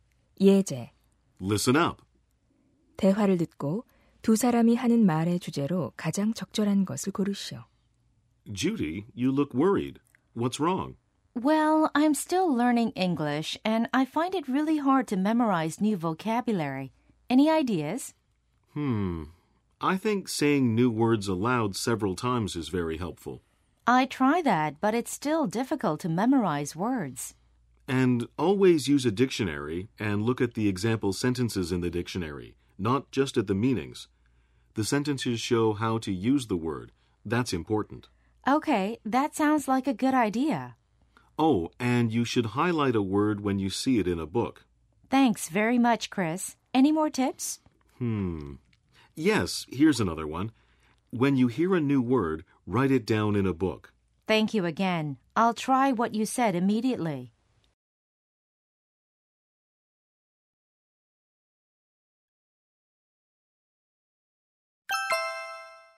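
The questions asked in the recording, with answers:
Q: 대화를 듣고 두 사람이 하는 말의 주제로 가장 적절한 것을 고르시오.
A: 영어 단어를 암기하는 방법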